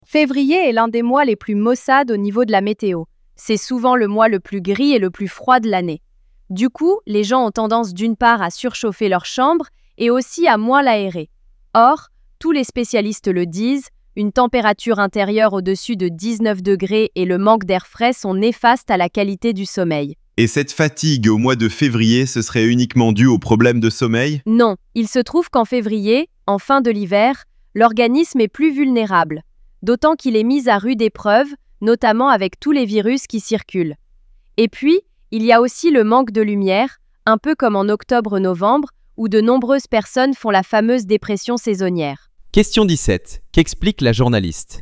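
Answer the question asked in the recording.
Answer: Les causes de la fatigue en février : mauvais sommeil (chambres trop chauffées, peu aérées), organisme vulnérable aux virus et manque de lumière.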